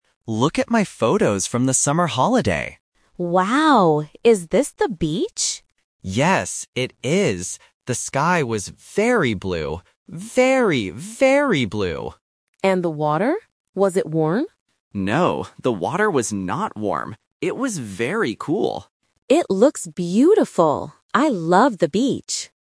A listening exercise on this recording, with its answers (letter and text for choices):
Listen to the conversation and choose the correct answer (A, B, or C).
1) What are the two students looking at?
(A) Photos of the beach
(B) A video of the beach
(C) Photos of the mountains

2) What color was the sky?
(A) Gray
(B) Blue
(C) White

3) How was the water at the beach?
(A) Warm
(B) Dirty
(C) Cool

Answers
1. (A) Photos of the beach
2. (B) Blue
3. (C) Cool

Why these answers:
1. Mark says, "Look at my photos" and confirms it is the beach. Option (B) is a trap: "beach" is mentioned, but they are looking at photos, not a video. Option (C) "mountains" is a plausible nature vocabulary word but is not mentioned.
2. Mark clearly states and repeats, "The sky was very blue. Very, very blue!". Options (A) and (C) are colors but are not mentioned in the audio.
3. Mark answers Anna's question by saying, "It was very cool." Option (A) is a trap: Anna asks "Was it warm?" but Mark rejects this by saying "No, the water was not warm." Option (B) is an adjective describing water but is not mentioned.

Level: A1